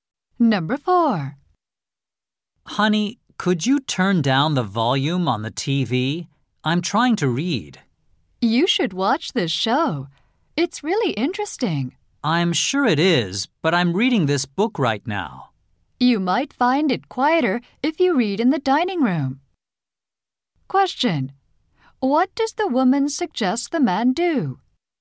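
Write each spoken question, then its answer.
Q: What does the woman suggest the man do?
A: Read in the dining room.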